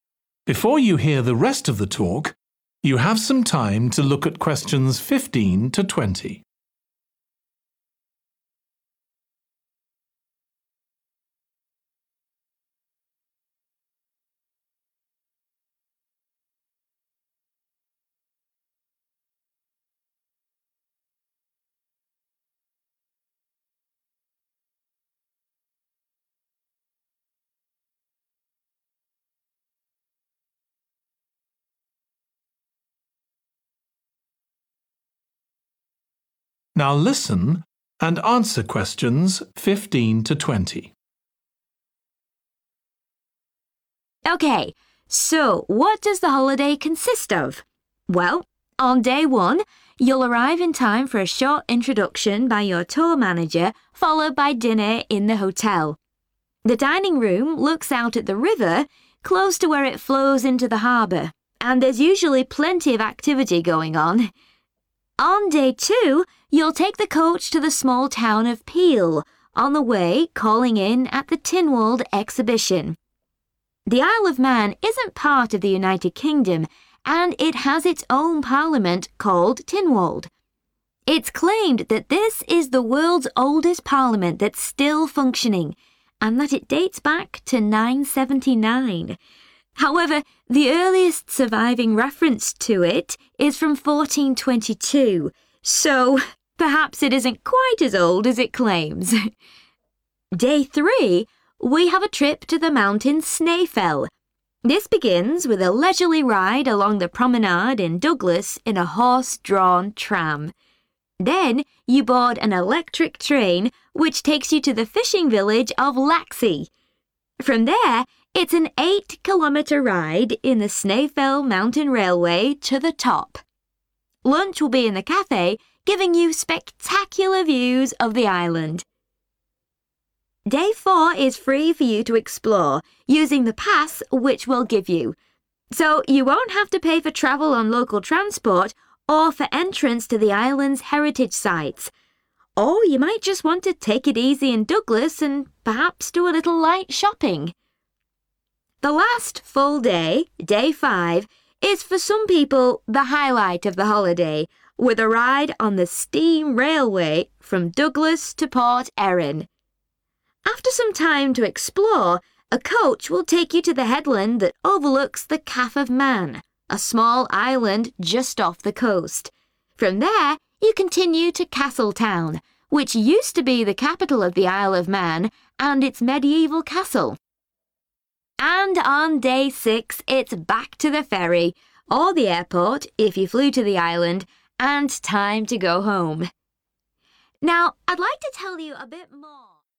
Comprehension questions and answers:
Complete the table below. Write ONE WORD AND/OR A NUMBER for each answer.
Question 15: Hotel dining room has view of the 15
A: river

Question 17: train to the 17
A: top

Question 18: Company provides a 18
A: pass

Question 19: Take the 19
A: steam

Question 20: Free time, then coach to Castletown – former 20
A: capital

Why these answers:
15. The dining room looks out at the river Excerpt/Transcript Explanation: The transcript explains that the dining room in the hotel has a view of the river, which means guests can see the river from there. Answer Explanation: The answer 'river' refers to a flowing body of water like the Amazon or Nile. It's a natural water source. Reason For Correctness: The correct answer is 'river' because it fits the context of looking out at a natural waterway, which aligns with the description of the dining room view in the hotel.
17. From there it's an eight-kilometre ride in the Snaefell Mountain Railway to the top. Excerpt/Transcript Explanation: The transcript talks about taking a ride on the Snaefell Mountain Railway to the highest point. Answer Explanation: The answer 'top' refers to the highest point, which is the summit or peak of the mountain. Reason For Correctness: The correct answer is 'top' because the excerpt mentions traveling to the top, which indicates reaching the summit of the mountain during the railway ride.
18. Day four is free for you to explore, using the pass which we'll give you. Excerpt/Transcript Explanation: The transcript means that on day four, you have the freedom to explore different places using a pass provided by the company. Answer Explanation: The answer 'pass' in this context refers to a document or ticket that allows you to access certain services or places without paying each time. Reason For Correctness: The correct answer is 'pass' because the excerpt mentions that the company will provide you with a pass for local transport and heritage sites, which implies a ticket or document giving access without further payment.
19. The transcript is talking about the last day of the holiday where people get to enjoy a ride on a special type of railway. Answer Explanation: The answer 'steam' refers to the type of train that runs on steam power. Reason For Correctness: The correct answer is appropriate because the steam railway mentioned in the transcript runs on steam power, which is a defining characteristic of this type of historic train.
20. From there you continue to Castletown, which used to be the capital of the Isle of Man, and its mediaeval castle. Excerpt/Transcript Explanation: The transcript says that Castletown was once the most important city of the Isle of Man. Answer Explanation: The answer 'capital' refers to the most important city in a country or region. Reason For Correctness: The correct answer 'capital' is right because the transcript says Castletown was the former 'capital' of the Isle of Man, meaning it was the most important city in the past.

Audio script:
Incidentally, we try to make booking our holidays as simple and fair as possible, so unlike with many companies, the price is the same whether you book six months in advance or at the last minute, and there's no supplement for single rooms in hotels. If you make a booking then need to change the start date, for example because of illness, you're welcome to change to an alternative date or a different tour, for a small administrative fee.
OK, so what does the holiday consist of? Well, on day one you'll arrive in time for a short introduction by your tour manager, followed by dinner in the hotel. The dining room looks out at the river, close to where it flows into the harbour, and there's usually plenty of activity going on.
On day two you'll take the coach to the small town of Peel, on the way calling in at the Tynwald Exhibition. The Isle of Man isn't part of the United Kingdom, and it has its own parliament, called Tynwald. It's claimed that this is the world's oldest parliament that's still functioning, and that it dates back to 979. However, the earliest surviving reference to it is from 1422, so perhaps it isn't quite as old as it claims!
Day three we have a trip to the mountain Snaefell. This begins with a leisurely ride along the promenade in Douglas in a horse-drawn tram. Then you board an electric train which takes you to the fishing village of Laxey. From there it's an eight-kilometre ride in the Snaefell Mountain Railway to the top. Lunch will be in the café, giving you spectacular views of the island.
Day four is free for you to explore, using the pass which we'll give you. So you won't have to pay for travel on local transport, or for entrance to the island's heritage sites. Or you might just want to take it easy in Douglas and perhaps do a little light shopping.
The last full day, day five, is for some people the highlight of the holiday, with a ride on the steam railway, from Douglas to Port Erin. After some time to explore, a coach will take you to the headland that overlooks the Calf of Man, a small island just off the coast. From there you continue to Castletown, which used to be the capital of the Isle of Man, and its mediaeval castle.
And on day six it's back to the ferry – or the airport, if you flew to the island – and time to go home.
Now I'd like to tell you ...